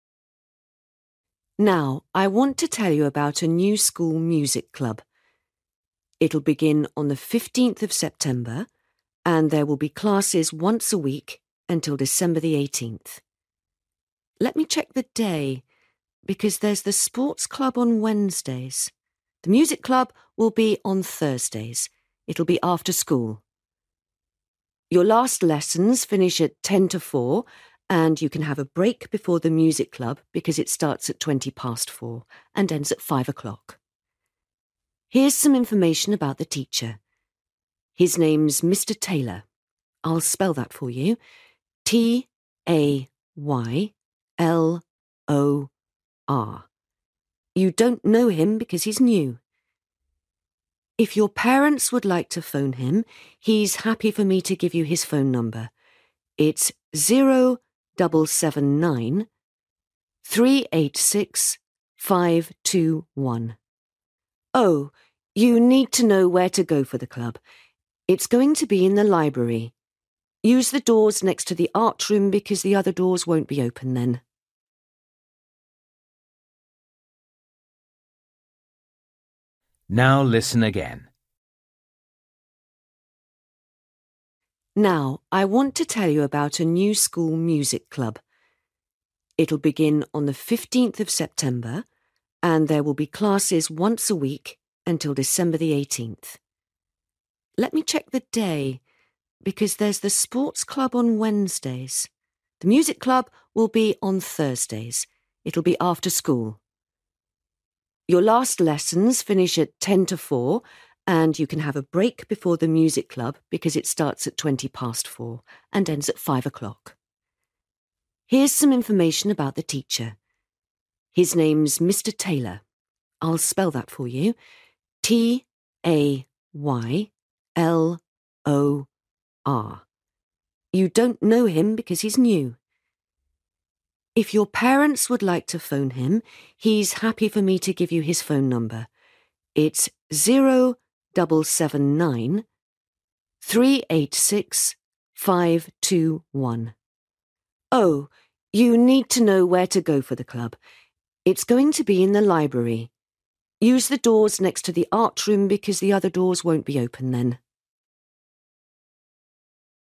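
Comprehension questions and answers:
For each question, write the correct answer in the gap. Write one word or a number or a date or a time.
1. Day club will meet: (1)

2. Time: (2) from to 5 p.m.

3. Teacher's name: (3) Mr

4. Teacher's phone number: (4)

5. Place: (5)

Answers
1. Thursday
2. 4.20
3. Taylor
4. 0779386521
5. library

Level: Luyện nghe trình độ A2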